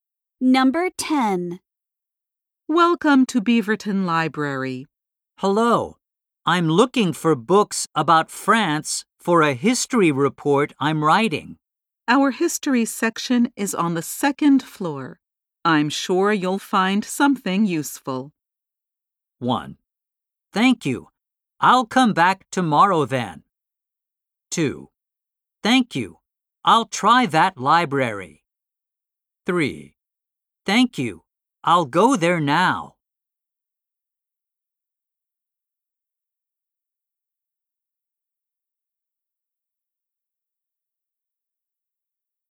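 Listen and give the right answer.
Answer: 3: Thank you. I'll go there now.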